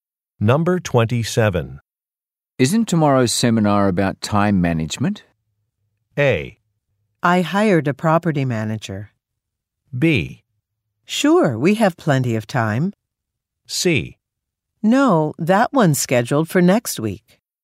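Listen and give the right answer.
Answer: C: No, that one's scheduled for next week.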